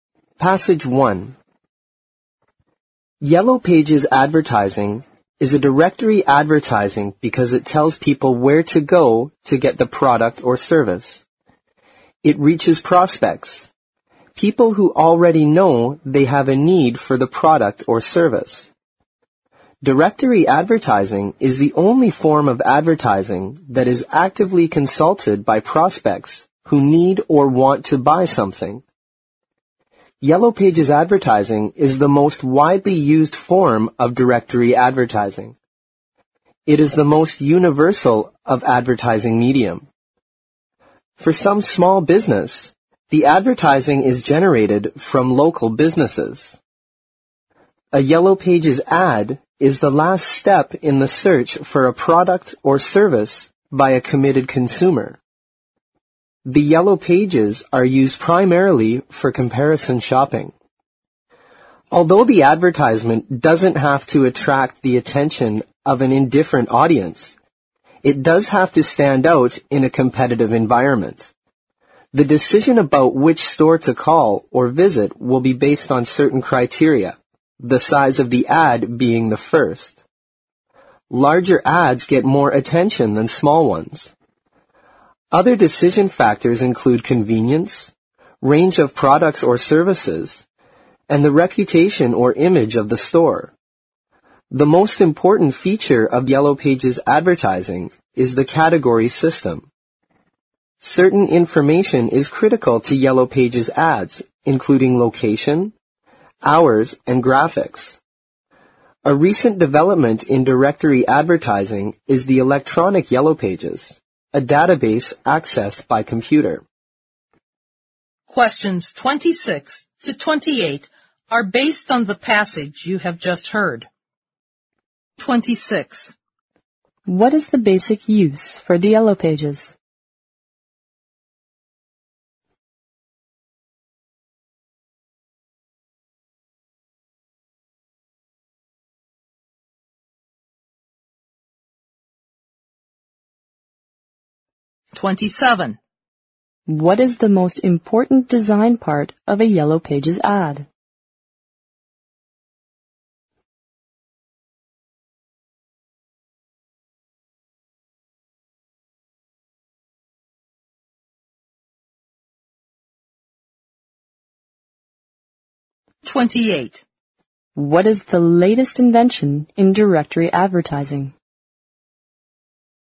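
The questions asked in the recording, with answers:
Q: What is the basic use for the Yellow Pages?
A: Comparison shopping

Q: What is the latest invention in directory advertising?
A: The electronic Yellow Pages, a database accessed by computer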